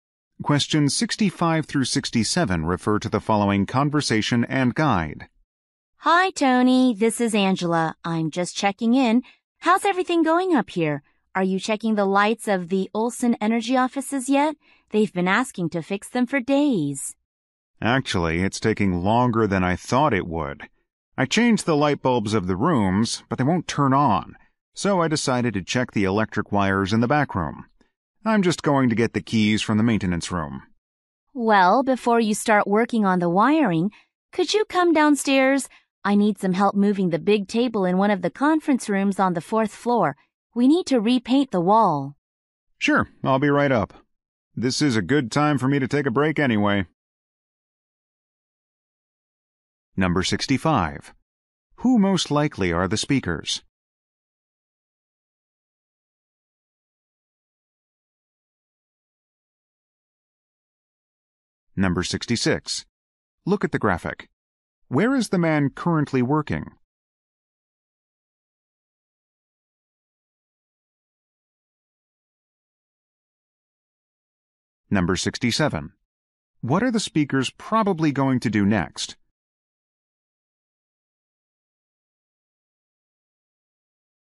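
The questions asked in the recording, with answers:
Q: Who most likely are the speakers?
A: Building maintenance workers

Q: What are the speakers probably going to do next?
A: Move a table in a conference room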